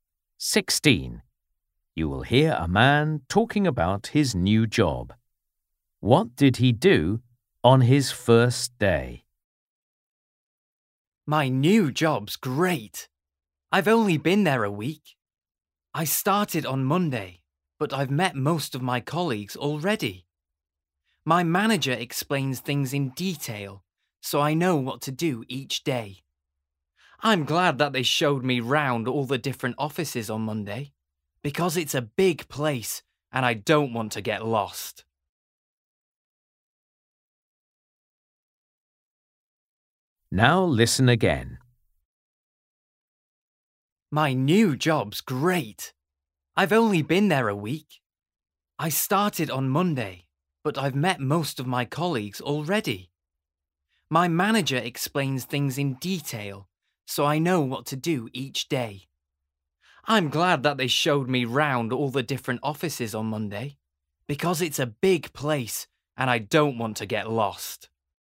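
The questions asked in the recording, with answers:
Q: What did he do on his first day?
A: He was shown round all the different offices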